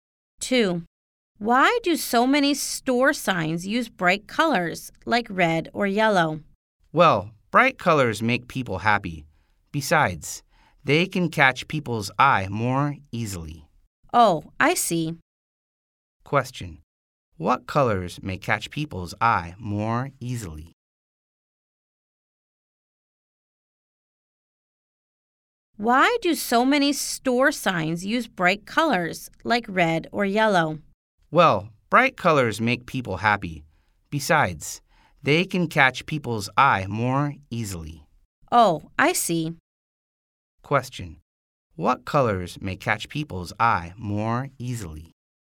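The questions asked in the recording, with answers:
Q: What colors may catch people's eye more easily?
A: Bright colors, like red or yellow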